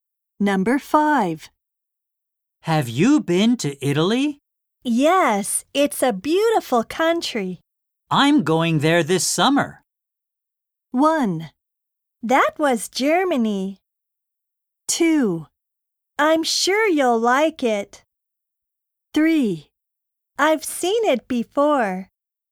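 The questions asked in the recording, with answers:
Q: I'm going there this summer.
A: 2: I'm sure you'll like it.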